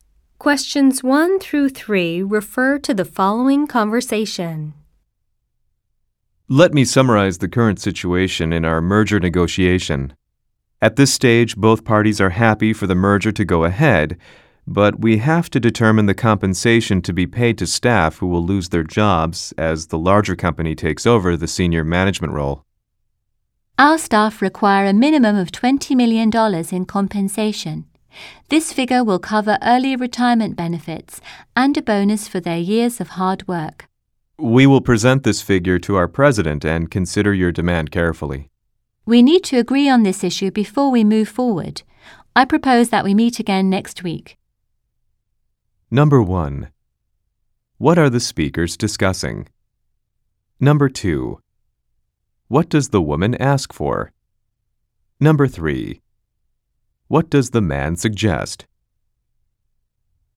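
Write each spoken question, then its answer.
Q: What are the speakers discussing?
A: Staff compensation in a merger negotiation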